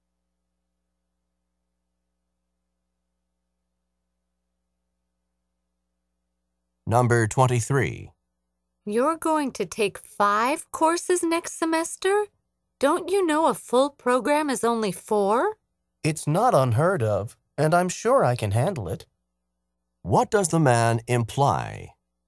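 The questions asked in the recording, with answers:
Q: What does the man imply?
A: He can handle five courses.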